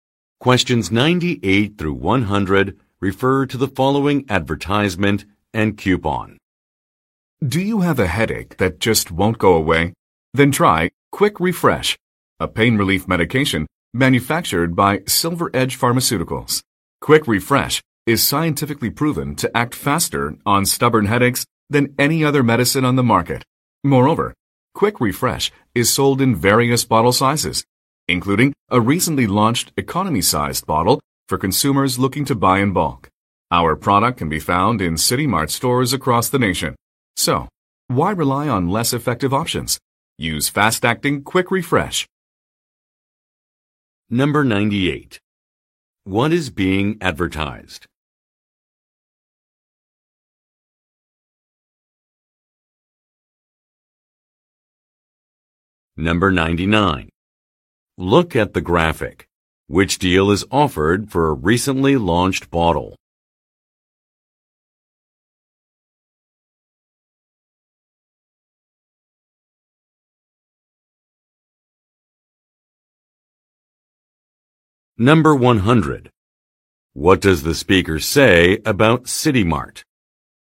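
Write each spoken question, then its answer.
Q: What is being advertised?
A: A pain relief medication (Quick Refresh)

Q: What does the speaker say about City Mart?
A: Its stores across the nation sell the product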